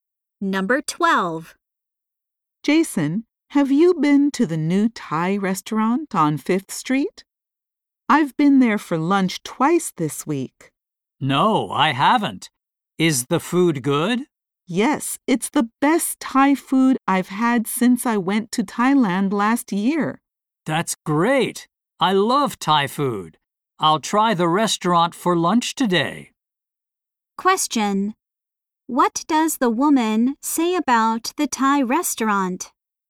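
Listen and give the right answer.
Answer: She has eaten lunch there twice this week, and it's the best Thai food she's had since her trip to Thailand.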